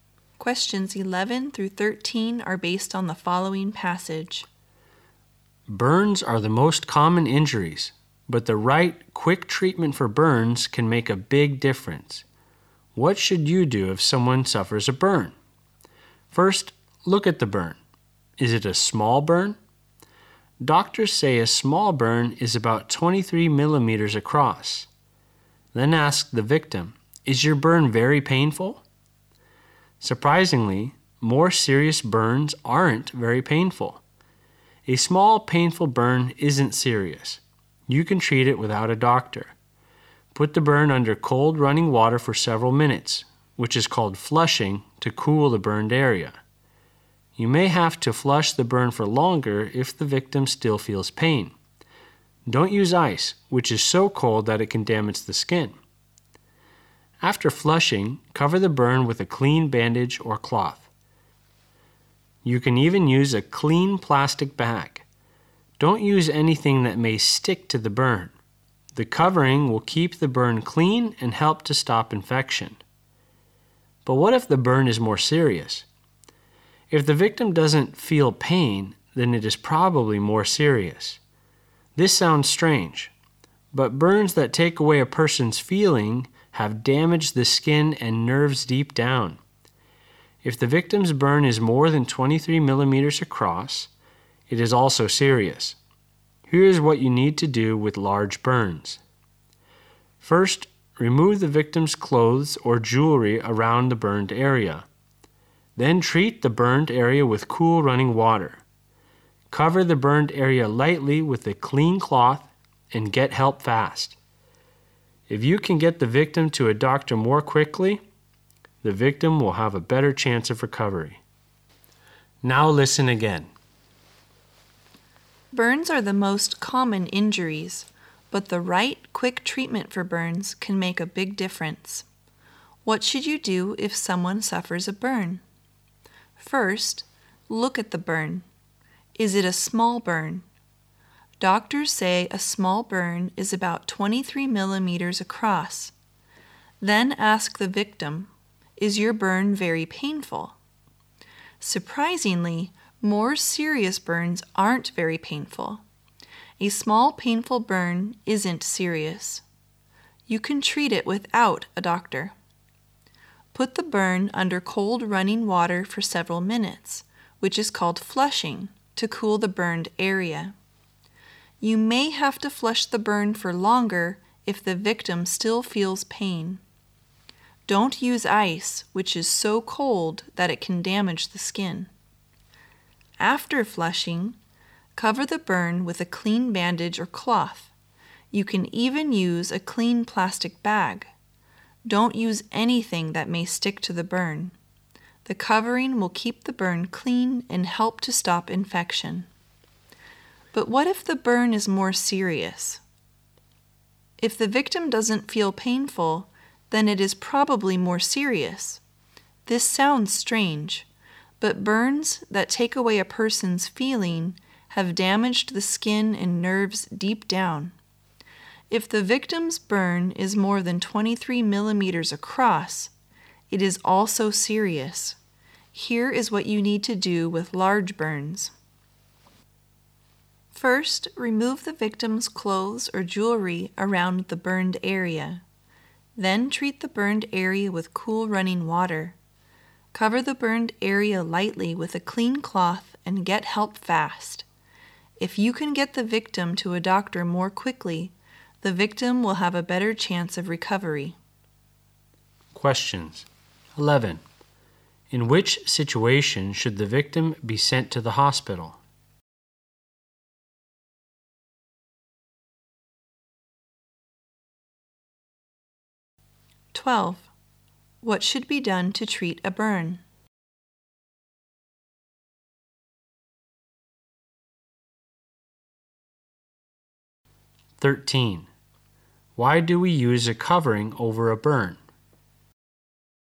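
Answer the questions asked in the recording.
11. When the burn is larger than 23 millimeters across or isn't painful
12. Put it under cold running water, then cover it with a clean cloth
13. To keep the burn clean and stop infection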